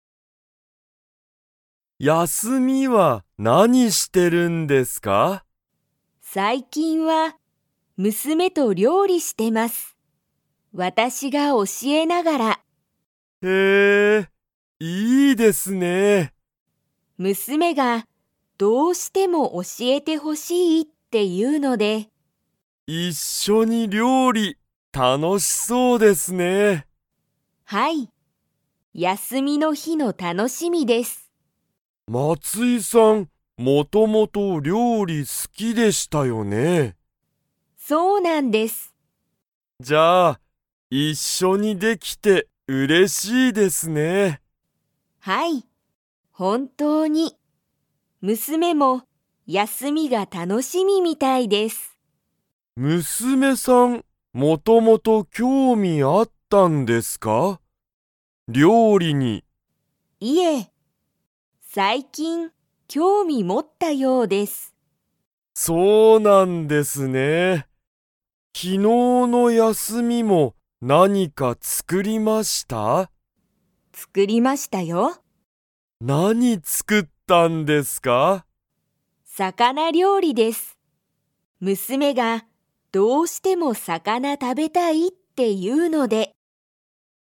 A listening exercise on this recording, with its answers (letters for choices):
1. 松井まついさんは、休やすみに誰だれと料理りょうりをしていますか?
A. 娘むすめ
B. 息子むすこ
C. 友人ゆうじん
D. 斉藤さいとうさん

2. 松井まついさんは昨日きのう 。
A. 料理りょうりした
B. 料理りょうりしなかった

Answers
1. A
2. A

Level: Level 3